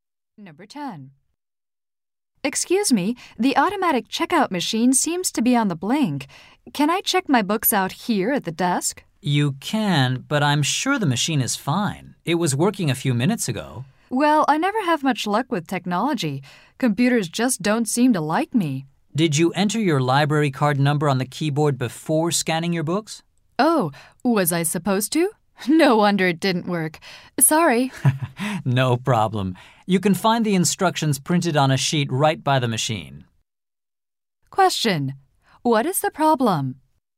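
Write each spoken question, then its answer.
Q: What is the problem?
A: The man didn't enter his library card number before scanning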